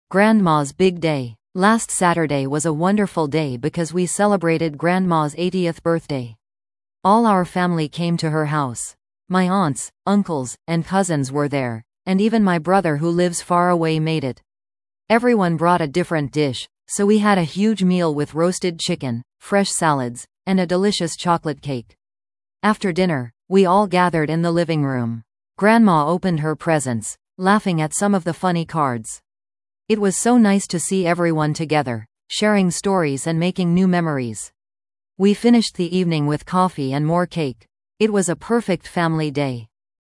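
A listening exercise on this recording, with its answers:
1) What special event did the family celebrate?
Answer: Grandma's 80th birthday.

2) Who attended the celebration?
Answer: Many family members, including a brother who lives far away.

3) What kind of food did they have?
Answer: A big meal with many different dishes.

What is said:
Grandma's Big Day
Last Saturday was a wonderful day because we celebrated Grandma's 80th birthday! All our family came to her house. My aunts, uncles, and cousins were there, and even my brother who lives far away made it. Everyone brought a different dish, so we had a huge meal with roasted chicken, fresh salads, and a delicious chocolate cake. After dinner, we all gathered in the living room. Grandma opened her presents, laughing at some of the funny cards. It was so nice to see everyone together, sharing stories and making new memories. We finished the evening with coffee and more cake. 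It was a perfect family day.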